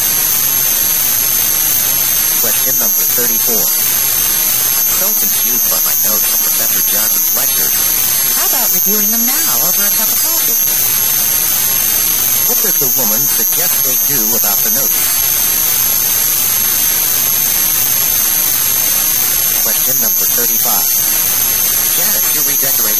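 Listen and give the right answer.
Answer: Review them together over coffee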